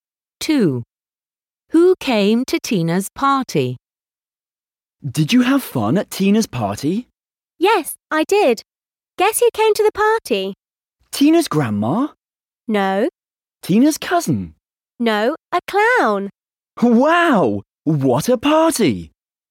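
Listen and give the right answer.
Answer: a clown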